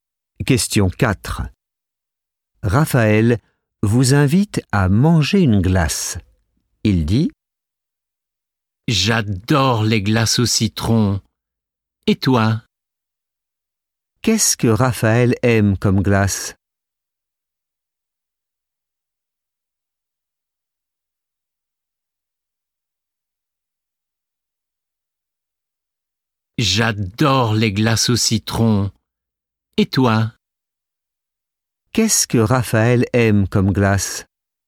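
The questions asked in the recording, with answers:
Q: Qu'est-ce que Raphaël aime comme glace?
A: les glaces au citron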